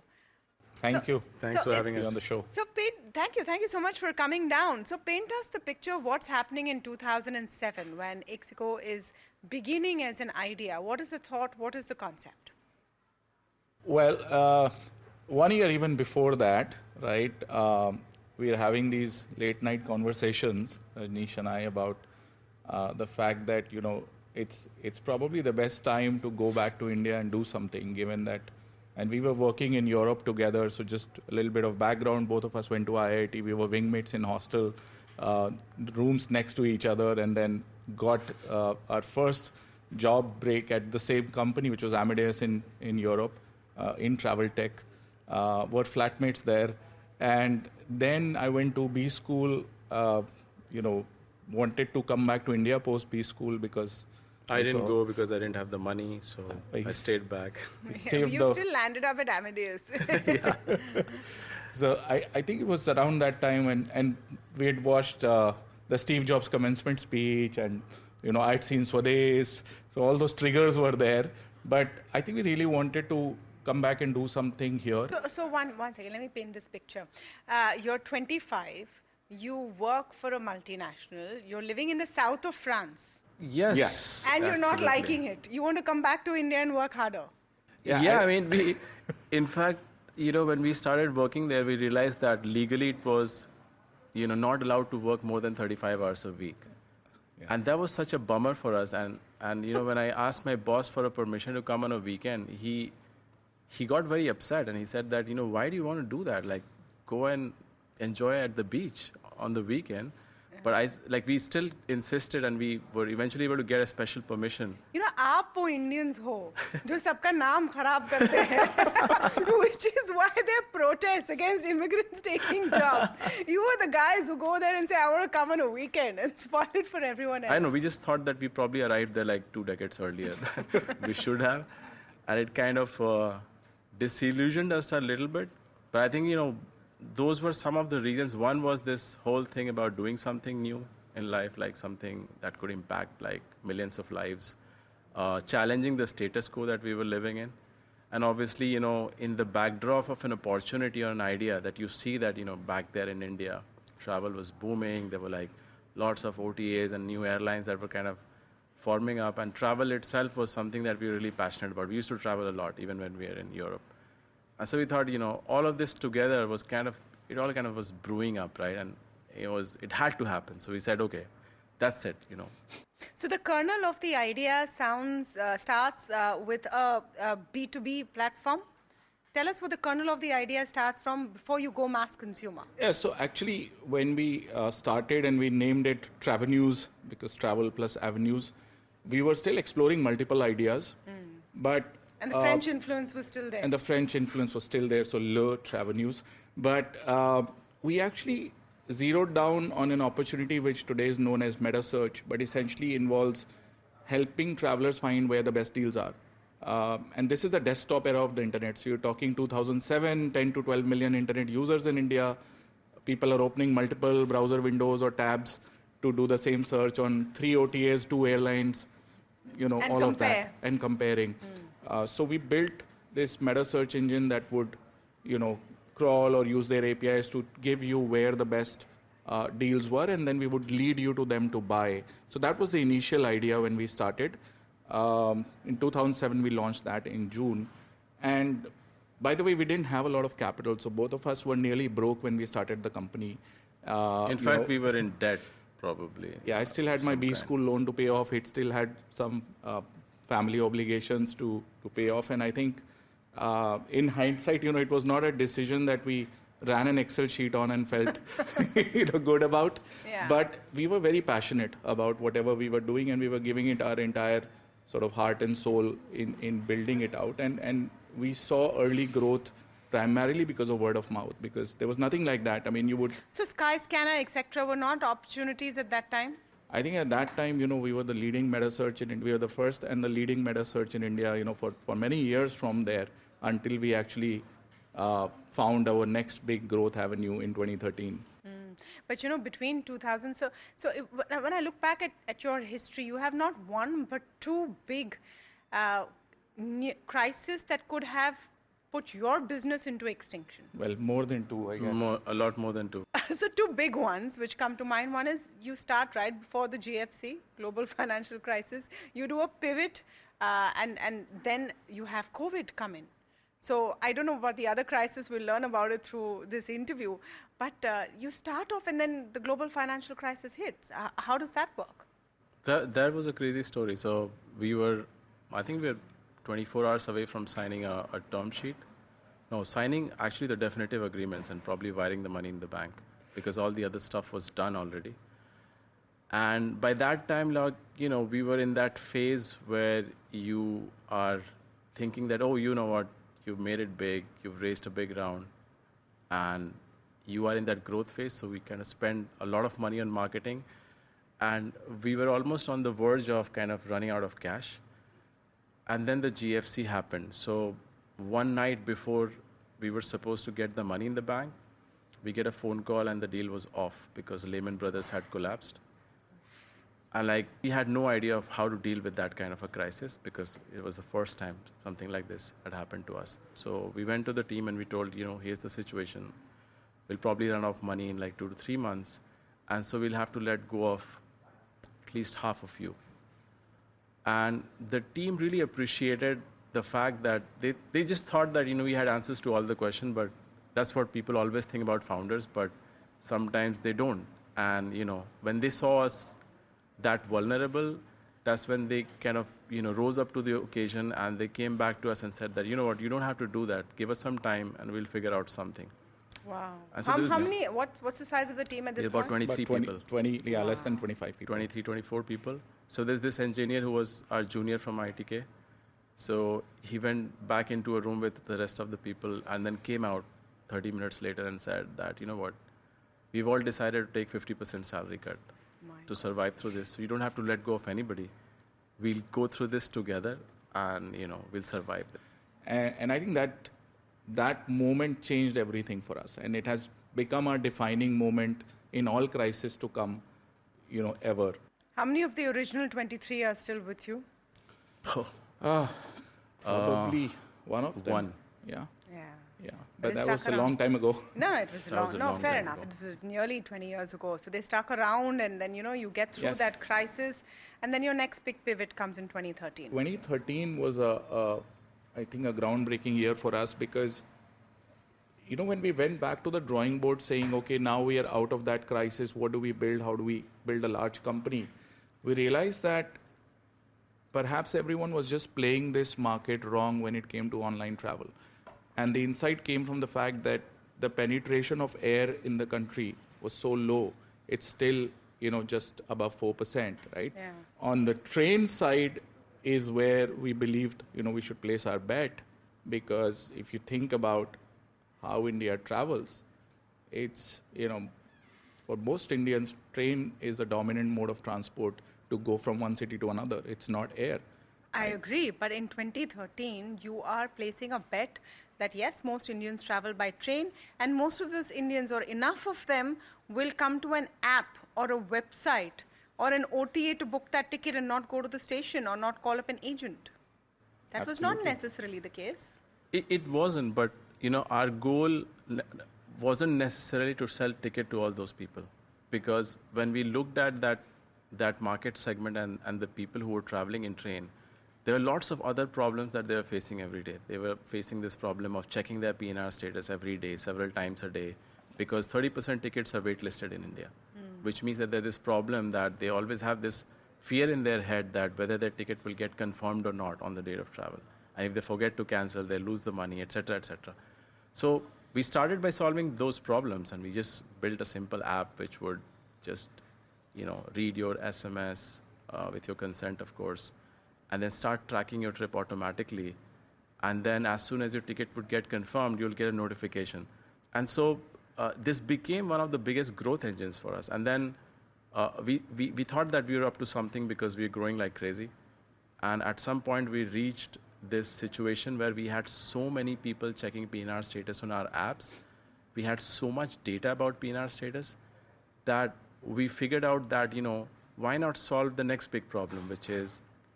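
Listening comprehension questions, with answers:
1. How old were the speakers and where were they living when they first wanted to leave their jobs and return to India?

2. Before the 2007 launch, what was the original name of their company, and what did it mean?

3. During the Global Financial Crisis, what specific action did the team take to save the company, and who proposed it?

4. What percentage of train tickets in India are waitlisted, and what problem did the founders solve for passengers regarding these tickets?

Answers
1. They were 25 and living in the south of France.
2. Travenues, meaning travel plus avenues.
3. The whole team took a 50% salary cut so nobody had to be let go. An engineer who was the founders' junior from IIT proposed it.
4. 30%. They built an app that tracked PNR status automatically and sent a notification when the ticket was confirmed, so passengers did not have to keep checking.

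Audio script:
First began thinking about an idea that seems very very obvious right now. I mean
Everyone flips open their phone and books their ticket whether it's for a train bus
Flight etc. In 2007 that was not necessarily the case. Isn't it welcome?
I look batch by and Rajneesh Kumar to this episode of the disruptors both
founders and CEO co-CEO of Ixigo
Thank you. Thanks for having it on the show. Thank you. Thank you so much for coming down
So paint us the picture of what's happening in 2007 when Ixigo is beginning as an idea. What is the thought?
What is the concept?
well
One year even before that, right?
We are having these late-night conversations Rajneesh and I about
The fact that you know, it's it's probably the best time to go back to India and do something given that and we were working in
Europe together, so just a little bit of background both of us went to IIT. We were wingmates in hostel
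Rooms next to each other and then got our first job break at the same company
Which was Amadeus in in Europe in travel tech
We were wing mmates in hostel uh rooms next to each other and then got uh our first job break at the same company which was amidas in in Europe uh in travelte uh were flatmates there and then I went to B school uh you know wanted to come back to India post B school because >> I didn't go because I didn't have the money so I stayed
back. you still landed up at Amdas. up at Amdas. >> Yeah. So I I think it was around that time and and we had watched uh the Steve Jobs commencement speech and you know I had seen sades so all those triggers were there but I think we really wanted to come back and do something here. >> So so one one second let me paint this picture. Uh you're 25 you work for a multinational you're living in the south of France. of France. >> Yes. >> Yes.
>> And you're not liking it. 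I mean we in fact you know when we started working there we realized that legally it was you know not allowed to work more than 35 hours a week >> and that was such a bummer for us and and you know when I asked my boss for a permission to come on a weekend he he got very upset and he said that you know why do you
want to do that like go and enjoy at the beach on the weekend but I like we still insisted and we were eventually able to get a special permission permission >> you know Indians which is why they protest against immigrants taking jobs. You were the guys who go there and say, "I want to come on a weekend and spoil it for everyone else." everyone else." >> I know. We just thought that we probably arrived there like two decades earlier. We should have and it kind of
uh disillusioned us a little bit. But I think you know those were some of the reasons. One was this whole thing about doing something new in life like something that could impact like millions of lives. 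uh challenging the status quo that we were living in and obviously you know in the backdrop of an opportunity or an idea that you see that you know back there in India travel was booming there were like lots of OTAAS and new airlines that were kind of forming up and travel
itself was something that we really passionate about we used to travel a lot even when we were in Europe and so we thought you know all of this together was kind of it all kind of was brewing up right and it was it had to happen so we said okay that's it you know >> so the kernel of the idea sounds uh starts uh with a B2B platform. Tell us where the kernel of the idea starts from before you go mass consumer. >> Yeah. So actually
when we uh started and we named it Travenu because travel plus avenues we were still exploring multiple ideas ideas >> but >> but >> and the French influence was still there >> and the French influence was still there. 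So lur travel news but u we actually zeroed down on an opportunity which today is known as meta search but essentially involves helping travelers find where the best deals are u and this is the desktop era of the internet so you're talking 2007 10 to 12 million internet
users in India people are opening multiple browser windows or tabs to do the same search on three OTAAS two airlines airlines >> you know all of that and comparing >> uh so we built this meta search engine that would you know crawl or use their APIs to give you where the best uh deals were and then we would lead you to them to buy. So that was the initial idea when we started. Um in 2007 we launched that in June. And by the way we didn't
have a lot of capital. So both of us were nearly broke when we started the company. Uh company. Uh >> in fact we were in debt probably. >> Yeah. I still had my B school loan to pay off. It still had some uh family obligations to to pay off. 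And I think uh in hindsight you know it was not a decision that we ran an excel sheet on and felt you know good about >> but we were very passionate about whatever we were doing and we
were giving it our entire sort of heart and soul in in building it out and and we saw early growth primarily because of word of mouth because there was nothing like that. I mean you would >> so sky scanner etc were not opportunities at that time. I think at that time you know we were the leading metaarch in we were the first and the leading meta search in India you know for for many years from there until we actually uh found our next big growth avenue
in 2013. avenue in 2013. >> But you know between 2000 so so when I look back at at your history you have not one but two big uh crisis that could have put your business into extinction. >> Well more than two I guess >> a lot more than two. >> So two big ones which come to mind. 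One is you start right before the GFC, global financial crisis. You do a pivot uh and and then you have COVID come in. So I don't know about the
other crisis. We'll learn about it through this interview. But uh you start off and then the global financial crisis hits. How does that work? does that work? >> That that was a crazy story. So we were I think we're 24 hours away from signing a a term sheet. No, signing actually the definitive agreements and probably wiring the money in the bank because all the other stuff was done already and by that time log you know we were in that phase where you are thinking that oh
you know what you've made it big you've raised a big round and you are in that growth phase so we kind of spend a lot of money on marketing and we were almost on the verge of kind of running out of cash and then the GFC happened. So one night before we were supposed to get the money in the bank, we get a phone call and the deal was off because layman brothers had collapsed and like we had no idea of how to deal with that
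kind of a crisis because it was the first time something like this had happened to us. So we went to the team and we told you know here's the situation. We'll probably run off money in like 2 to 3 months and so we'll have to let go of at least half of you. And the team really appreciated the fact that they they just thought that you know we had answers to all the question but that's what people always think about founders but sometimes they don't and
you know when they saw us that vulnerable that's when they kind of you know rose up to the occasion and they came back to us and said that you know what you don't have to do that give us some time and we'll figure out something. something. >> Wow. How many what what's the size of the team at this point? >> About 23 people 20 yeah less than 25 people. people. >> 23 24 people. So there's this engineer who was our junior from ITK. So he went
back into a room with the rest of the people and then came out 30 minutes later and said that you know what we've all decided to take 50% salary cut >> to survive through this. 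We'll go through this together and you know we'll survive and and I think that that moment changed everything for us and it has become a defining moment in all crisis to come you know ever. How many of the original 23 are still with
you? Uh Uh >> probably one of them. Yeah. >> Yeah. >> Yeah. >> Yeah. But that was a long time ago. >> No, it was long. No, fair enough. It was nearly 20 years ago. So they stuck around and then you know you get through that crisis and then your next big pivot comes in 2013. comes in 2013. >> 2013 was a I think a groundbreaking year for us because for us because you know when we went back to the drawing board saying okay now we
are out of that crisis. What do we build? How do we build a large company? We realized that that perhaps everyone was just playing this market wrong when it came to online travel and the insight came from the fact that the penetration of air in the country was so low. 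It's still you know just above 4%. Right >> on the train side is where we believed you know we should place our bet because if you think about how India travels >> it's you know for most
Indians train is the dominant mode of transport to go from one city to another. It's not air. >> I agree. But in 2013, you are placing a bet that yes, most Indians travel by train and most of those Indians or enough of them will come to an app or a website or an OTAA to book that ticket and not go to the station or not call up an agent. an agent.
But in 2013, you are placing a bet that yes, most Indians travel by train and most of those Indians or enough of them, will come to an app or a website or an OTA to book that ticket and not go to the station or not call up an agent. That was.
But, you know, our goal wasn't necessary to sell ticket to all those people because when we looked at that, that market segment and, and the people who were traveling in train, there are lots of other problems that they are facing every day.
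They were facing this problem of checking their PNR status every day, several times a day because 30% tickets are wait listed in India which means that there this problem that they always have this fear in their head that whether their ticket will get confirmed or not on the day of travel. And if they forget to cancel, they lose.
The money, etc, etc.
So we started by solving those problems and we just built a simple app which would just, you know, read your SMS with your consent, of course, and then start tracking your trip automatically.
And then as soon as your ticket would get confirmed, you'll get a notification.
And so this became one of the biggest growth engines for us.
And then we, we, we thought that we were up to something because we're growing like crazy.
And at some point, we reached this situation where we had so many people checking PNR status on our apps, we had so much data about PNR status that we figured out that, you know, why not solve the next big problem.

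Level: CEFRC1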